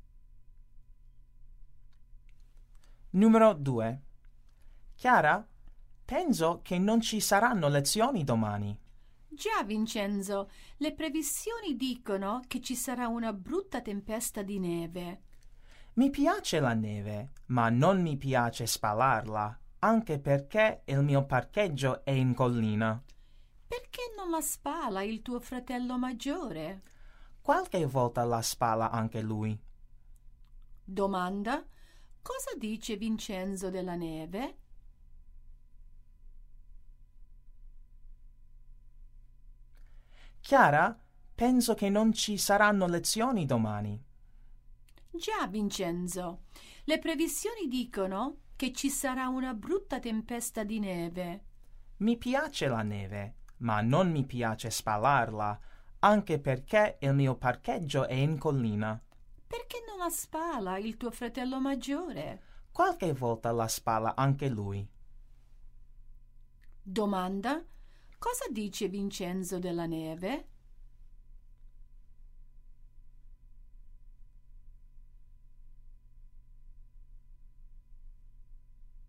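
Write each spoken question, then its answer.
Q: Cosa dice Vincenzo della neve?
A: Gli piace, ma non gli piace spalarla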